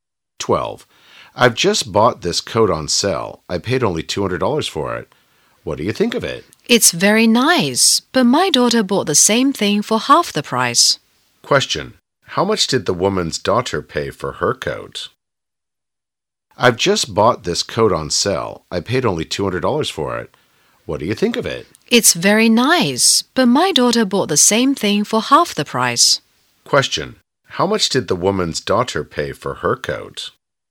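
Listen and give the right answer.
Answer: $100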